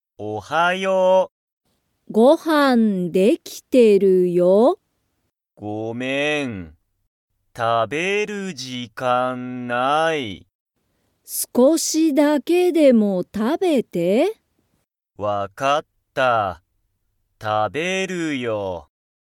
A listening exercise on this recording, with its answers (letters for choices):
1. タカシは、朝(あさ)ご飯(はん)を食(た)べますか?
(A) はい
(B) いいえ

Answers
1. A

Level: Level 1